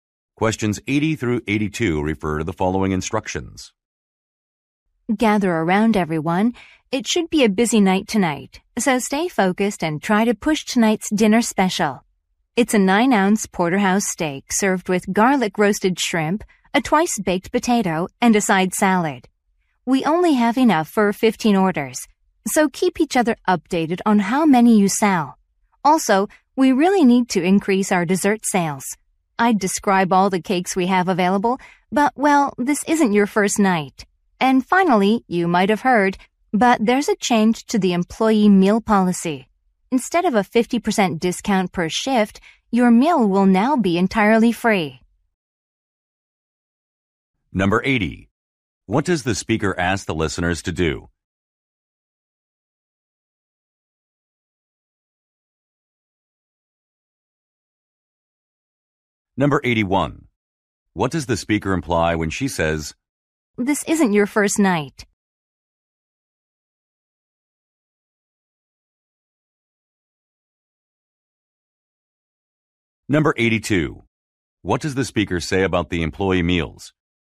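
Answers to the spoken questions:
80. Promote the dinner special
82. They will now be free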